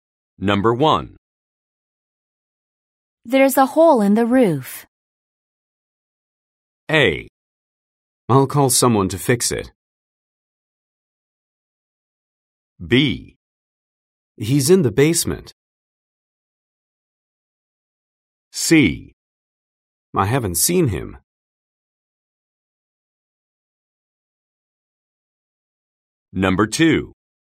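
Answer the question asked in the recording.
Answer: A: I'll call someone to fix it.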